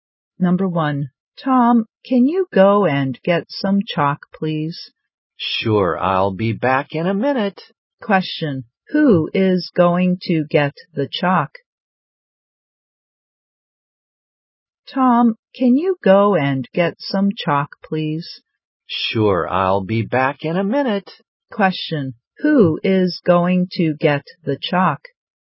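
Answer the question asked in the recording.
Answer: Tom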